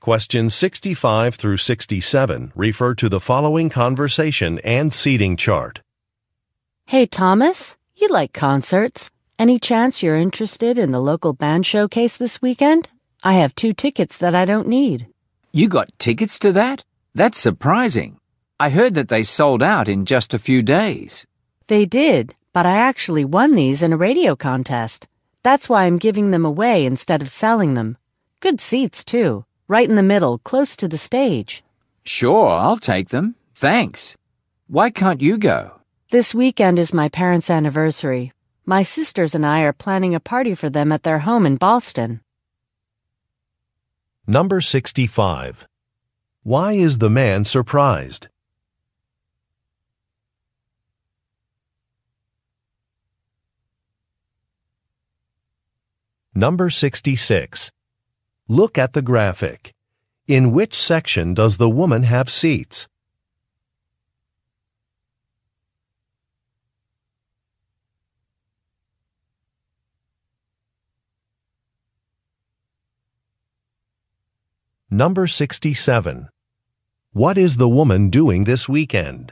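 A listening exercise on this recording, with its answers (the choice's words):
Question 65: Why is the man surprised?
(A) A popular band is coming to town.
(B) The woman plays a musical instrument.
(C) The woman was able to get concert tickets.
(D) Some musicians scheduled a second concert.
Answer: The woman was able to get concert tickets.

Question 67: What is the woman doing this weekend?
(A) Practicing with her band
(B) Entering a radio contest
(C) Moving to Boston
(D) Attending a party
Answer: Attending a party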